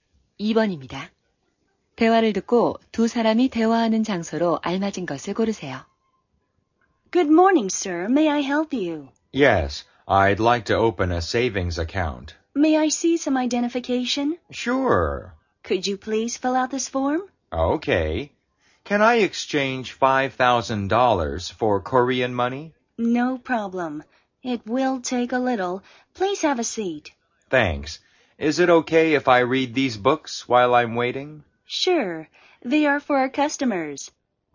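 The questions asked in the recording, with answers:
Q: 대화를 듣고 두 사람이 대화하는 장소로 알맞은 것을 고르세요.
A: 은행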